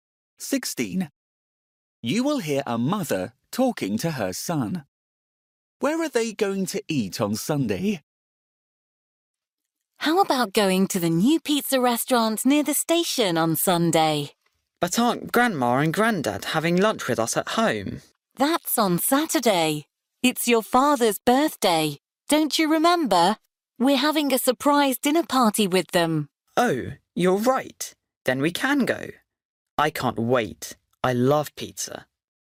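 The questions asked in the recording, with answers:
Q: Where are they going to eat on Sunday?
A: At the new pizza restaurant near the station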